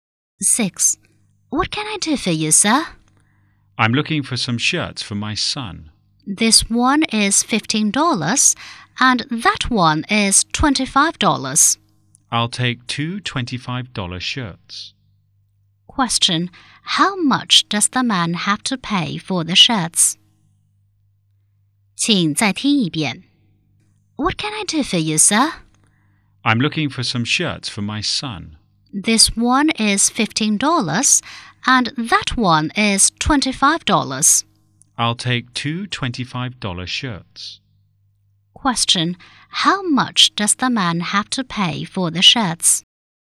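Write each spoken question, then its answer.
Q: Question. How much does the man have to pay for the shirts?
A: $50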